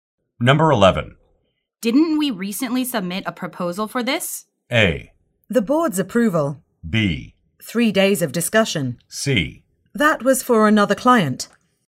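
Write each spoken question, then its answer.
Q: Didn't we recently submit a proposal for this?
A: C: That was for another client.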